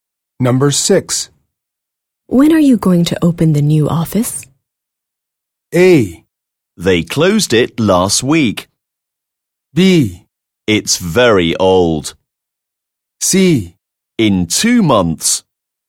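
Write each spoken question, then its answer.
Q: When are you going to open the new office?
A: C: In 2 months.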